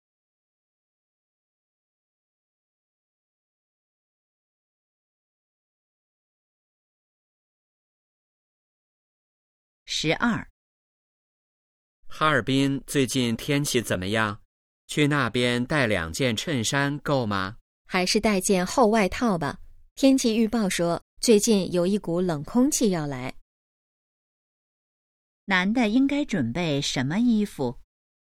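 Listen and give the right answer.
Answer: 厚外套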